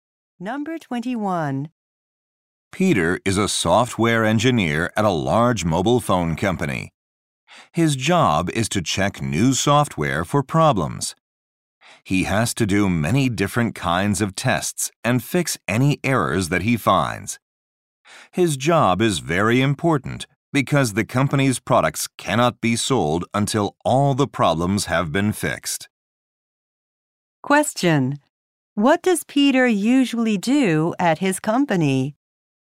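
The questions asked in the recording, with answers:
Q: What does Peter usually do at his company?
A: Check new software for problems.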